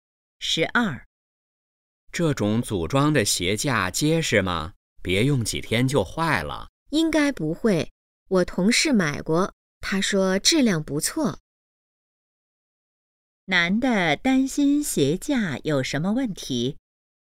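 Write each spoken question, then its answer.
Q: 男的担心鞋架有什么问题?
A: 不结实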